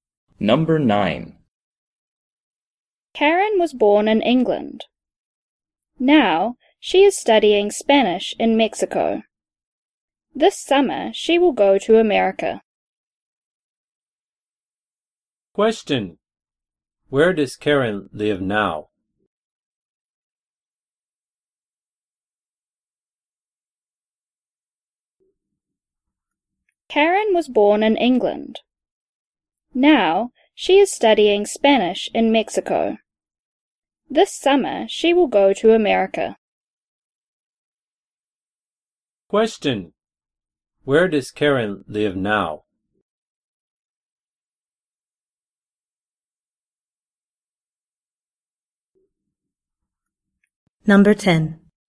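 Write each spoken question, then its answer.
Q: Where does Karen live now?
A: Mexico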